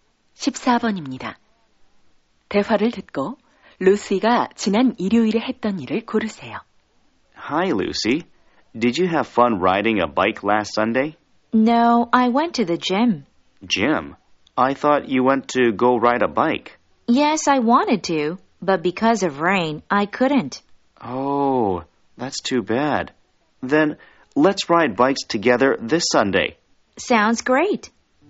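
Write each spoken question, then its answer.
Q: 대화를 듣고 루시가 지난 일요일에 했던 일을 고르세요.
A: 체육관에 갔다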